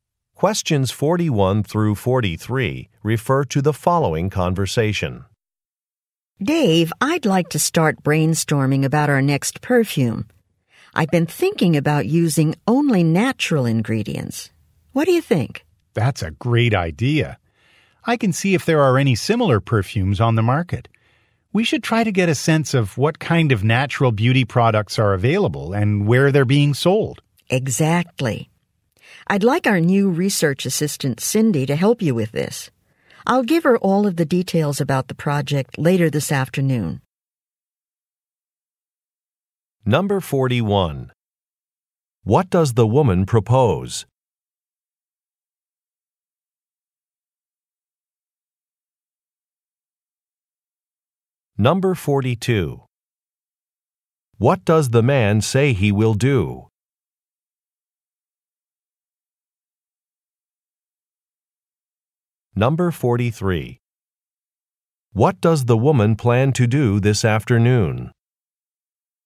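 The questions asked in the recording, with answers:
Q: What does the woman propose?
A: Using only natural ingredients in their next perfume

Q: What does the man say he will do?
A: Check whether similar perfumes are on the market

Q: What does the woman plan to do this afternoon?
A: Give Cindy the project details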